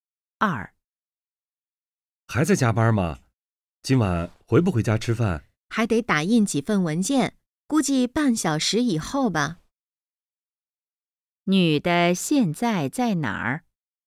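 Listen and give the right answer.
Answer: 在公司(办公室)加班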